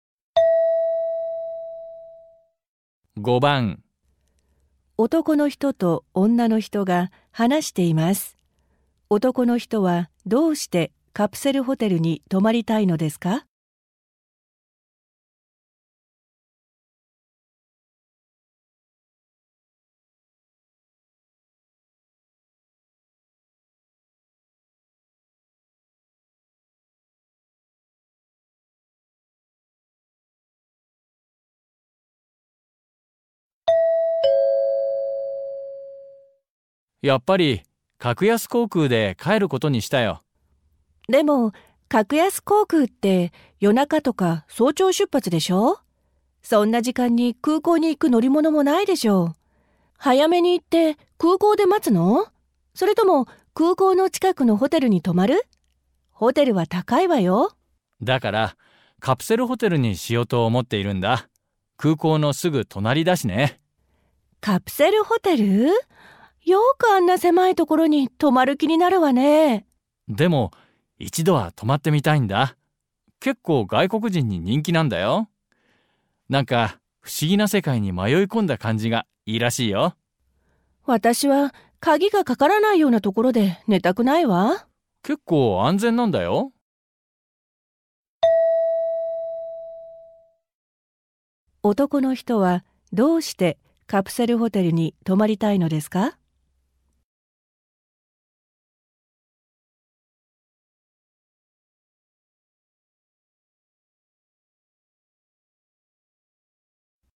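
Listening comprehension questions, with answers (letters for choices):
問題2では、まず質問を聞いてください。そのあと、問題用紙のせんたくしを読んでください。読む時間があります。それから話を聞いて、問題用紙の1から4の中から、最もよいものを一つ選んでください。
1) 男の人はどうしてカプセルホテルに泊まりたいのですか。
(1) ドアがないけど安全だから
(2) 高いけど外国人に人気だから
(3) 空港から遠いけれど安いから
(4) 珍しい経験ができるから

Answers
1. 4

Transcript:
男の人と女の人が話しています。男の人はどうしてカプセルホテルに泊まりたいのですか。
M:やっぱり、格安航空で帰ることにしたよ。/Quả nhiên, tớ đã quyết định sẽ về bằng máy bay giá rẻ.
F:でも、格安航空って夜中とか早朝出発でしょう?そんな時間に空港に行く乗り物もないでしょう。早めに行って空港で待つの?それとも空港の近くのホテルに泊まる?ホテルは高いわよ。
M:だから、カプセルホテルにしようと思っているんだ。空港のすぐ隣だしね。
F:カプセルホテル?よくあんな狭いところに泊まる気になるわね。
M:でも、一度は泊まって見たいんだ。結構外国人に人気なんだよ。何か不思議な世界に迷い込んだ感じがいいらしいよ。
F:私は鍵がかからないようなところで寝たくないわ。/Tớ không muốn ngủ ở nơi không khóa cửa.
M:結構安全なんだよ。/Khá an toàn đấy.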